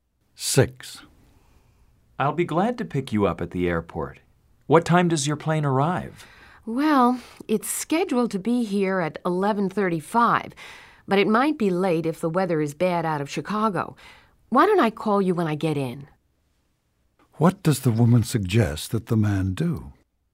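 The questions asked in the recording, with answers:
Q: What does the woman suggest that the man do?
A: Wait for her call when she arrives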